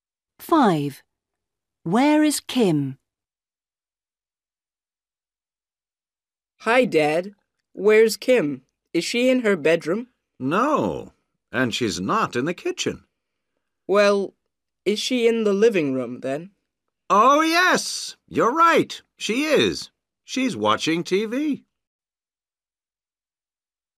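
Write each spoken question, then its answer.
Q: Where is Kim?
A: in the living room, watching TV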